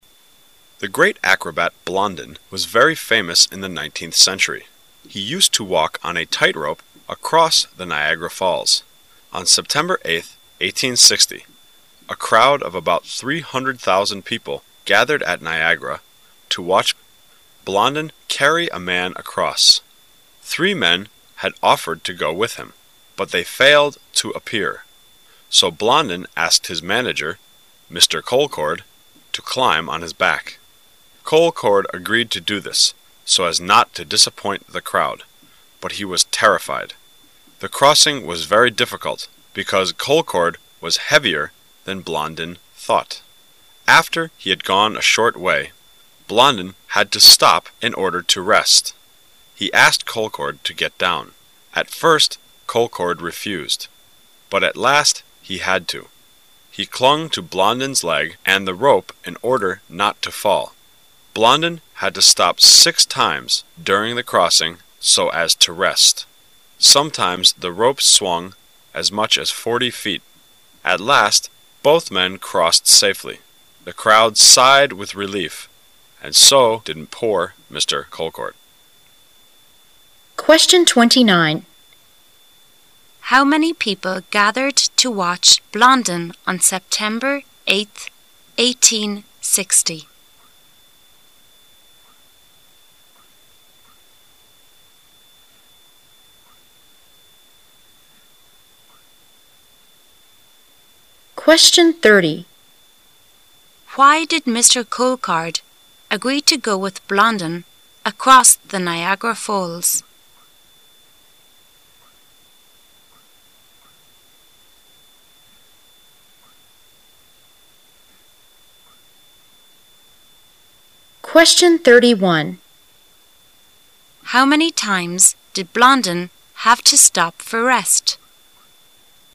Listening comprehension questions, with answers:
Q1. Why did Mr. Colcord agree to go with Blondin across the Niagara Falls?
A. He had promised to do so.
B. He had this kind of training before.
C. He didn't want to make the crowd disappointed.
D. He needed the great amount of money.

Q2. How many times did Blondin have to stop for rest?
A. Three times.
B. Four times.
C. Six times.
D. Seven times.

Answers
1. C. He didn't want to make the crowd disappointed.
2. C. Six times.

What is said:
[解析] 29-31 The great acrobat, Blondin, was very famous in the 19th century. He used to walk on a tight-rope across the Niagara Falls. On September 8th, 1860, a crowd of about 300,000 people gathered at Niagara to watch. Blondin carried a man across! Three men had offered to go with him, but they failed to appear, so Blondin asked his manager, Mr. Colcord, to climb on his back. Colcord agreed to do this so as not to disappoint the crowd, but he was terrified. The crossing was very difficult because Colcord was heavier than Blondin thought. After he had gone a short way, Blondin had to stop in order to rest. He asked Colcord to get down. At first Colcord refused, but at last he had to. He clung to Blondin's leg and the rope in order not to fall. Blondin had to stop six times during the crossing so as to rest. Sometimes the ropes swung as much as 40 feet! At last both men crossed safely. The crowd sighed with relief--and so did poor Mr. Colcord! How many people gathered to watch Blondin on September 8th, 1860?

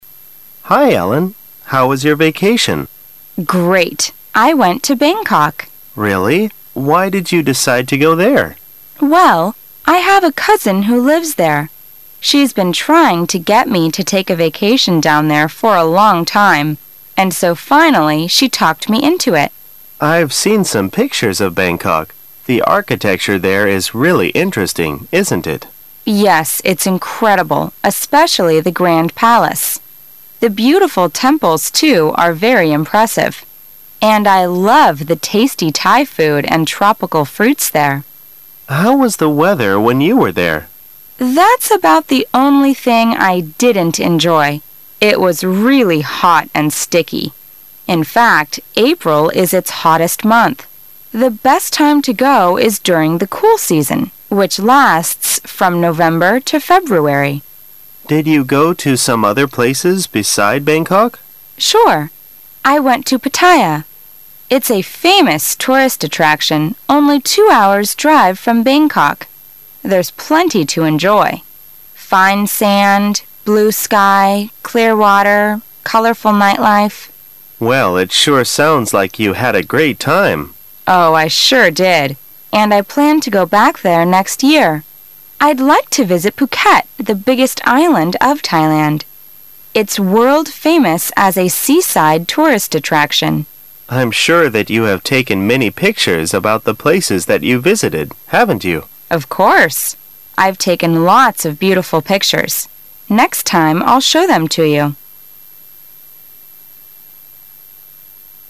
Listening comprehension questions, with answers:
Questions 11 - 13 are based on the following dialogue about Ellen's vacation in Thailand.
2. How about Thai food in Ellen's opinion?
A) It's sour.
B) It's delicious.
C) It's bitter.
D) It's hot.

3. Which of the following is true according to the dialogue?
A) Ellen didn't like the temples in Thailand.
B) Ellen didn't go to other places except Bangkok.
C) Ellen visited Phuket, the largest island of Thailand.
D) Ellen plans to go back to Thailand next year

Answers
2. B) It's delicious.
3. D) Ellen plans to go back to Thailand next year

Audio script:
[解析] 11-13 M: Hi, Ellen. How was your vacation? W: Great! I went to Bangkok. M: Really? Why did you decide to go there? W: Well, I have a cousin who lives there. She's been trying to get me to take a vacation down there for a long time, and so, finally, I went there. M: I've seen some pictures of Bangkok -- the architecture there is really interesting, isn't it?. W: Yes, it's incredible, especially the Grand Palace. The beautiful temples, too, are very impressive. And I love the tasty Thai food and tropical fruits there. M: How was the weather when you were there? W: That's about the only thing I didn't enjoy. It was really hot and sticky. In fact, April is its hottest month. The best time to go Is during the cool season, which lasts from November to February. M: Did you go to some other places beside Bangkok? W: Sure. It's a famous tourist attraction, only two hours' drive from Bangkok. There's plenty to enjoy: fine sand, blue sky, clear water, colorful night life. M: Well, it sure sounds like you had a great time. W: Oh, I sure did. And I plan to go back there next year. I'd like to visit Phuket, the biggest island of Thai land. It's world-famous as a seaside tourist attraction. M: I'm sure that you have taken many pictures about the places that you've visited, haven't you? W: Of course. I've taken lots of beautiful pictures. Next time I'll show them to you.

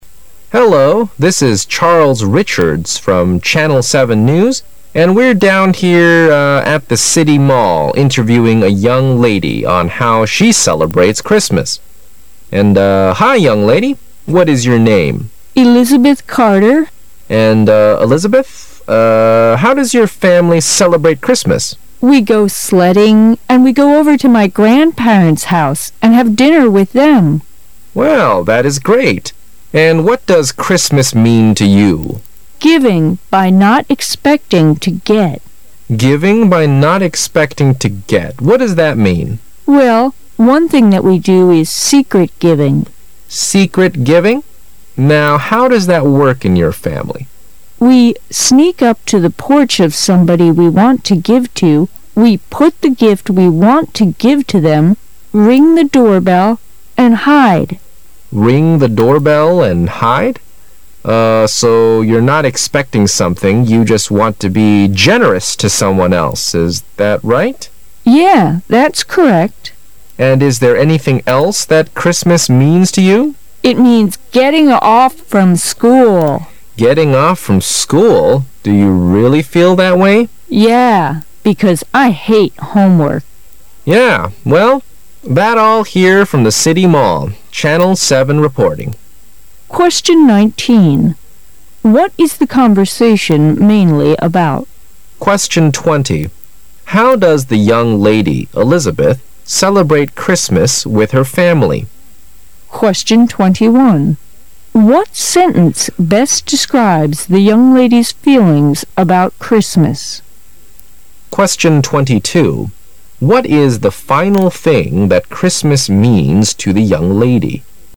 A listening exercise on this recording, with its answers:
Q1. What sentence best describes the young lady's feelings about Christmas?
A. It's a time when people exchange gifts with friends, family, and teachers.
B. It's a holiday when friends give gifts during an elaborate dinner.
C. It's a day when people think of others without waiting for a gift in return.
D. It's a time that you can receive lots of gifts.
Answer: C. It's a day when people think of others without waiting for a gift in return.

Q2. What is the final thing that Christmas means to the young lady?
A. Giving presents from classmates.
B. Having a big dinner with the family.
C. Sleeping late every day.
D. Having a vacation from school.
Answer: D. Having a vacation from school.

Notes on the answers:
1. 该题是对谈话细节内容的考查,由Giving by not expecting to get,secret giving和so you're not expecting something;you just want to be generous to someone else.三句内容可推出,选项中只有C)最符合谈话内容,表示"圣诞节是一个为他人着想而不期待回赠礼物的节日",其中be generous暗示think of others, secret giving暗示without waiting for a gift in return。选项中A)表示"圣诞节是个与朋友、家人和老师互赠礼物的节日",B)表示"圣诞节是一个在丰盛的晚宴上朋友赠送礼物的节日",而D)则表示"圣涎节是个你可以收到很多礼物的节日"。
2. 从It means getting off from school!和Because I hate homework.两句可断定,对于谈话中的年轻女士来说,圣诞节还意味着不用上学和做家庭作业,也就是放假,选项中只有D)最符合题意。干扰性较强的一项是C)即"天天睡懒觉",放假或许意味着睡懒觉,但谈话内容并没有明确涉及这一项,因此排除C)。

